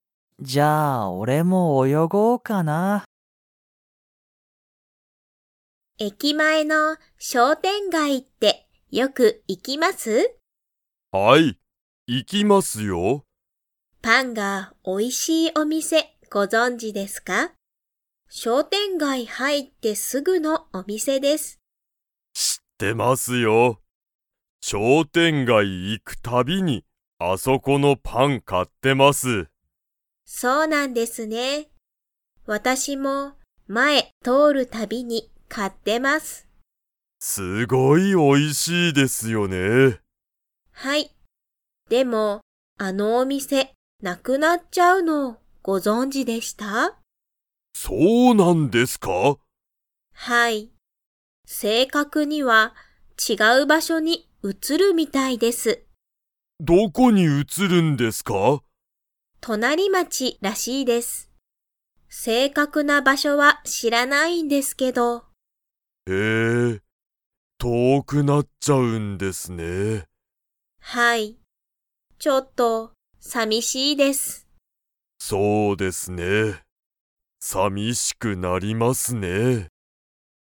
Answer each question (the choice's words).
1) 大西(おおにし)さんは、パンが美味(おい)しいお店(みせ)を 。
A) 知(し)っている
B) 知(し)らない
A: 知(し)っている

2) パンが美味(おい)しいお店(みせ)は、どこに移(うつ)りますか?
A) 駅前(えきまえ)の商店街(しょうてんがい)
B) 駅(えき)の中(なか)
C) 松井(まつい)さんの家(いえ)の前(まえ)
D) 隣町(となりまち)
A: 隣町(となりまち)

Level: Level 4